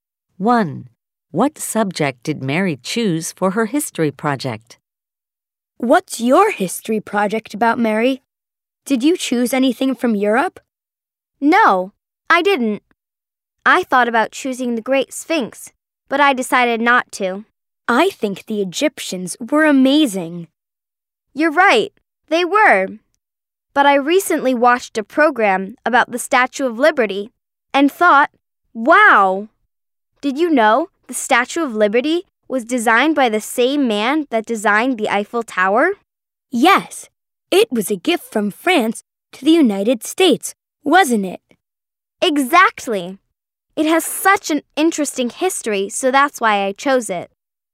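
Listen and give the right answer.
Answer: The Statue of Liberty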